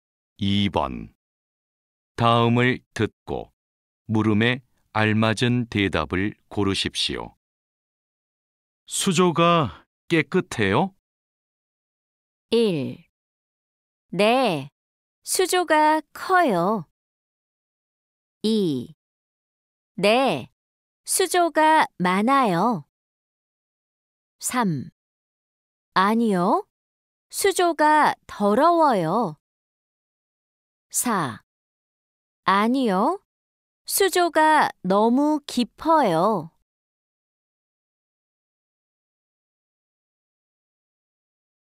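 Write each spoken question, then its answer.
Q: 수조가 깨끗해요?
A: 3: 아니요, 수조가 더러워요.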